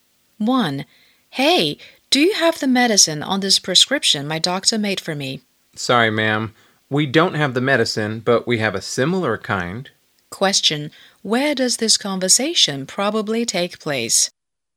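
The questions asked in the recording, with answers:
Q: Where does this conversation probably take place?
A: In a pharmacy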